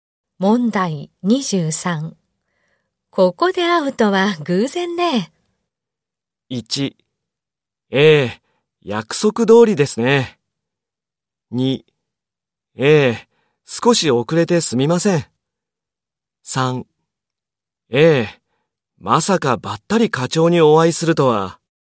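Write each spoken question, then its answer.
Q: ここで会うとは偶然ね。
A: 3: ええ、まさかばったり課長にお会いするとは。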